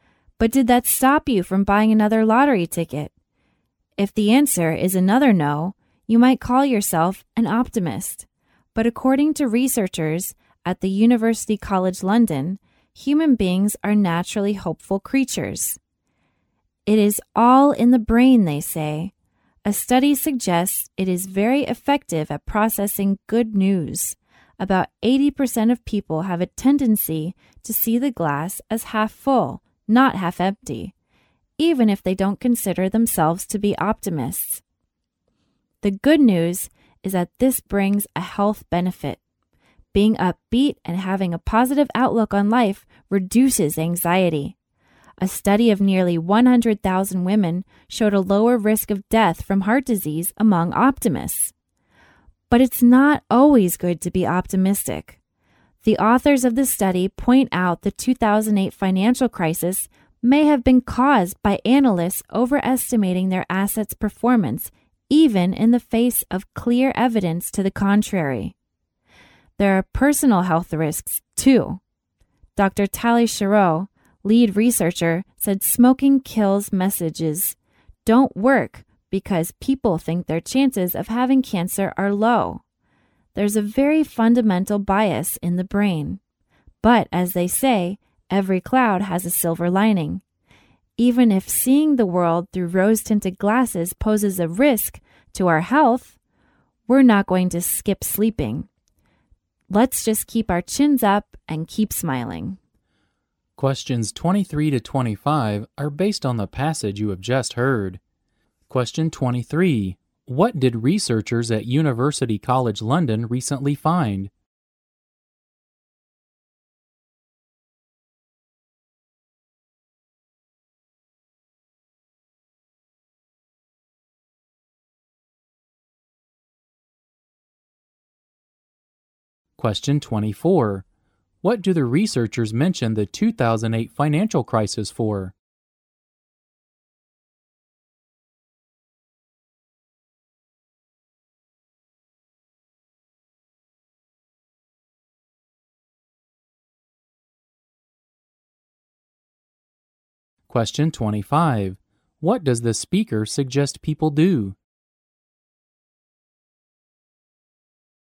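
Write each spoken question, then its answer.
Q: What did researchers at University College London recently find?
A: Human beings are naturally hopeful/optimistic; the brain is very effective at processing good news.

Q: What do the researchers mention the 2008 financial crisis for?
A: To show that being optimistic is not always good; analysts overestimated their assets' performance.

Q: What does the speaker suggest people do?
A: Keep their chins up and keep smiling (stay optimistic).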